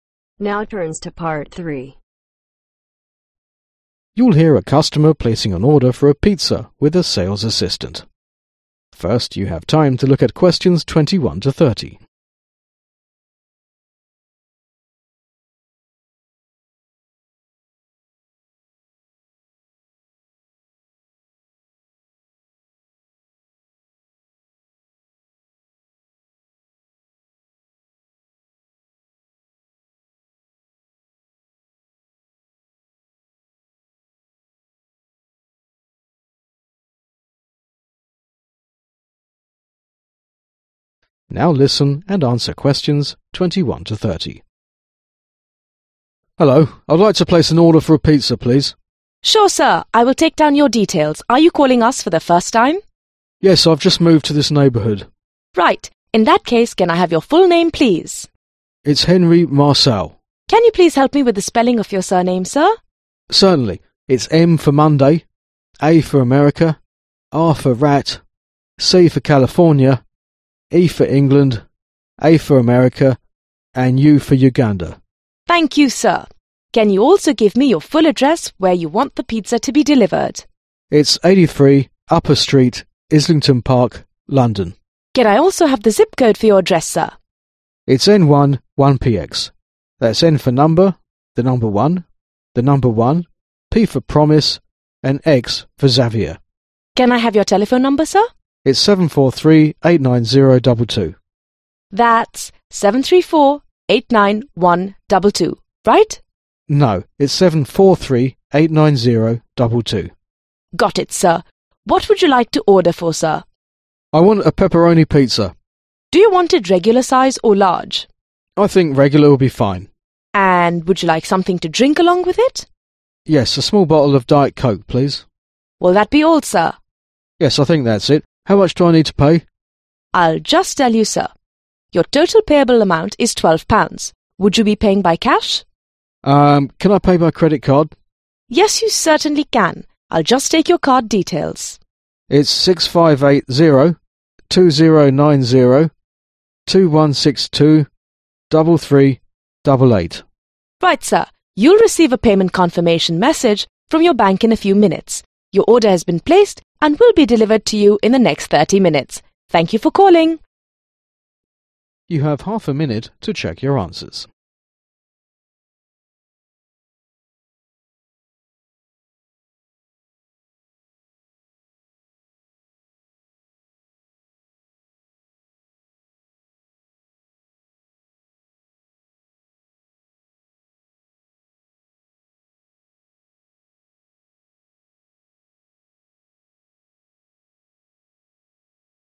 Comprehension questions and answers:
complete the order form below using NO MORE THAN THREE WORDS for each blank.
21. Full name: Henry (21) ...........................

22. Address: (22) .................. Upper street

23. (23) .................. Park, London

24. Zip code (24) ..........................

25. Telephone number: (25) .................................9022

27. One small bottle of (27) ...................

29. Payment method: (29) ........................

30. Credit card number: 6580 (30) ..................3388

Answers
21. MARCEAU
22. 83
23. ISLLNGTON
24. N11PX
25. 7438
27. DIET COKE
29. CREDIT CARD
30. 2090 2162